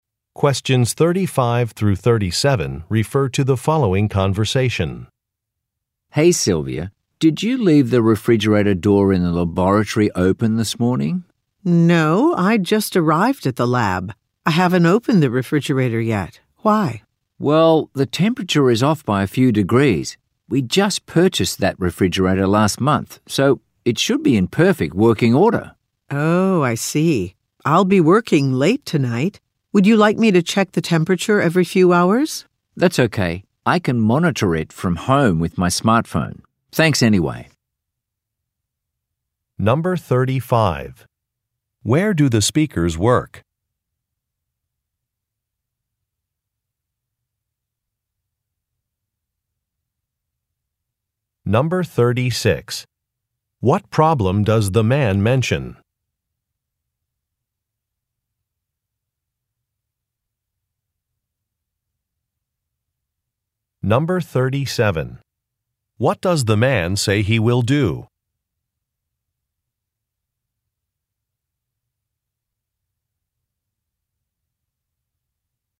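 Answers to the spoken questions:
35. In a laboratory
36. The refrigerator's temperature is off by a few degrees
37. Monitor the temperature from home with his smartphone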